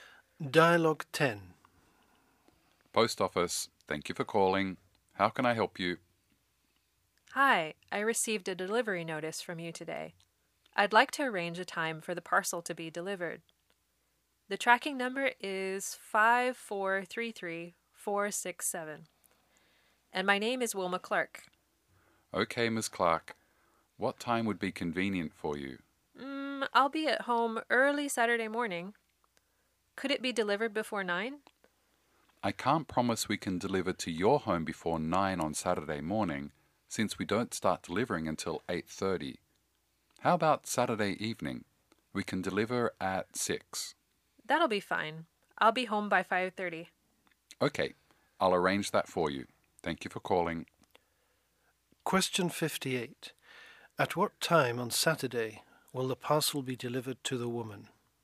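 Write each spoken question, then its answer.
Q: At what time on Saturday will the parcel be delivered to the woman?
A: 6 o'clock (in the evening)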